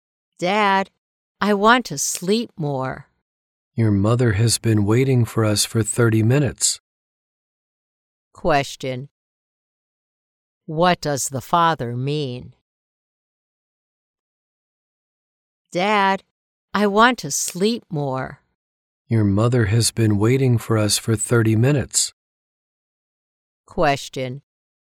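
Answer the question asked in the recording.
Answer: The child should get up now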